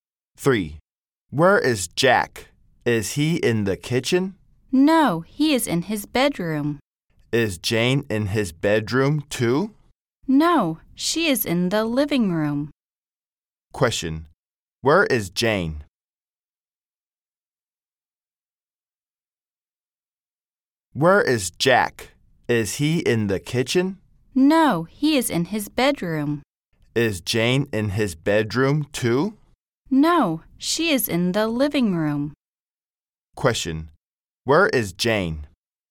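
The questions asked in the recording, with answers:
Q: Question, where is Jane?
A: In the living room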